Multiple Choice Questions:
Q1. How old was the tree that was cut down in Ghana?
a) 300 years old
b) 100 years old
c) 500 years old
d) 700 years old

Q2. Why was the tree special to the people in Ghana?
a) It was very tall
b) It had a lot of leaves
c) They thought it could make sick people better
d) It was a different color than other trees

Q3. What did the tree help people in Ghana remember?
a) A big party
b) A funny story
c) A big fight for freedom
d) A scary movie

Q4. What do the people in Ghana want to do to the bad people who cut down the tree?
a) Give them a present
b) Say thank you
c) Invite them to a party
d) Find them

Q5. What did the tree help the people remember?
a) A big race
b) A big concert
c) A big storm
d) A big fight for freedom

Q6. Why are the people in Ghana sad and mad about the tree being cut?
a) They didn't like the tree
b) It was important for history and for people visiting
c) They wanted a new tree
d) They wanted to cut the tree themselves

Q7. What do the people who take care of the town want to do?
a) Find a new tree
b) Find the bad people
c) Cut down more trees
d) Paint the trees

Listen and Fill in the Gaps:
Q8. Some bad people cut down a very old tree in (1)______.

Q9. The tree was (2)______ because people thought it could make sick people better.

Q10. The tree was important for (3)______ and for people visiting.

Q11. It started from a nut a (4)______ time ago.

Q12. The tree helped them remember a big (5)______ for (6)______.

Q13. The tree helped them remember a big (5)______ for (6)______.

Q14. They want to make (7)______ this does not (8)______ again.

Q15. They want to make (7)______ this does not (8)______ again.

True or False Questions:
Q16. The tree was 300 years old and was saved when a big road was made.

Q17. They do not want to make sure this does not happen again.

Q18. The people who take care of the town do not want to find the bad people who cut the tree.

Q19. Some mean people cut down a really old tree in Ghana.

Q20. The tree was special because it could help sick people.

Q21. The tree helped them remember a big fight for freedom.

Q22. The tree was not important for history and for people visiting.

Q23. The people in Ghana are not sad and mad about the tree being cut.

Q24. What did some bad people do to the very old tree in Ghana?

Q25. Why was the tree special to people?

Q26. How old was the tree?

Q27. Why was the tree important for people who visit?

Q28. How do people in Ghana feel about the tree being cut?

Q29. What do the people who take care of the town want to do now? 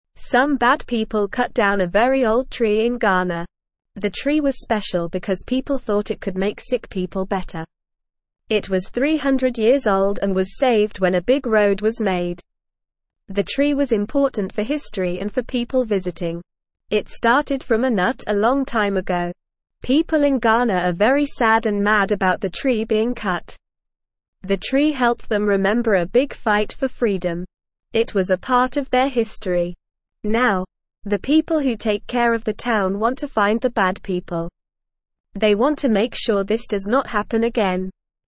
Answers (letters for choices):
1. a
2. c
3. c
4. d
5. d
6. b
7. b
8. Ghana
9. special
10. history
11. long
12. fight
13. freedom
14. sure
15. happen
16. True
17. False
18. False
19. True
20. True
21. True
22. False
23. False
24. Some bad people cut down the very old tree.
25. The tree was special because people thought it could heal sick people.
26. The tree was 300 years old.
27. The tree was important because it was part of history and people liked to see it.
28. People in Ghana are very sad and mad about the tree being cut.
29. The people who take care of the town want to find the bad people and stop this from happening again.

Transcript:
Some bad people cut down a very old tree in Ghana. The tree was special because people thought it could make sick people better. It was 300 years old and was saved when a big road was made. The tree was important for history and for people visiting. It started from a nut a long time ago.
People in Ghana are very sad and mad about the tree being cut. It was a part of their history. Now, the people who take care of the town want to find the bad people. They want to make sure this does not happen again.

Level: Level 1